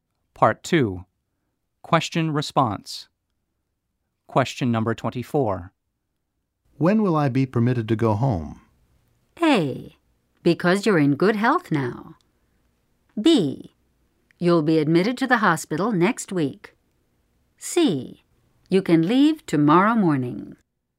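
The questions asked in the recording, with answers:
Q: When will I be permitted to go home?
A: C: You can leave tomorrow morning.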